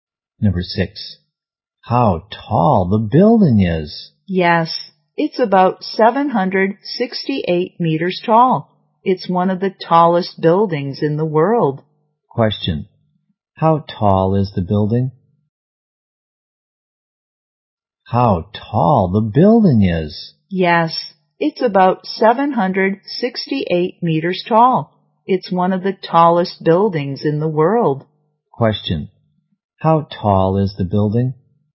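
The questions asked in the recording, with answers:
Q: How tall is the building?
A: About 768 meters tall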